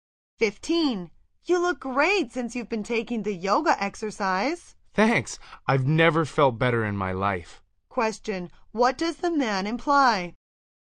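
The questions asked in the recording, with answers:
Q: What does the man imply?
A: The yoga exercise has done him a lot of good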